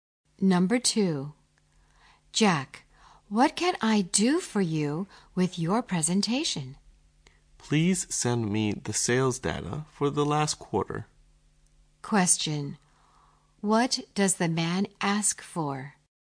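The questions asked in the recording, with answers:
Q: What does the man ask for?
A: The sales data for the last quarter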